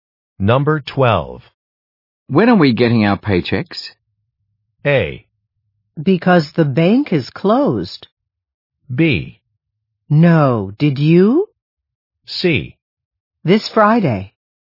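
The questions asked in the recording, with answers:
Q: When are we getting our paychecks?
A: C: This Friday.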